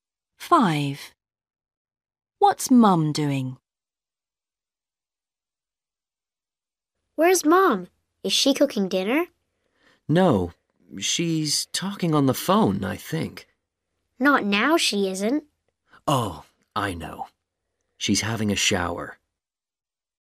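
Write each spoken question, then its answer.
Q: What's Mum doing?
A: having a shower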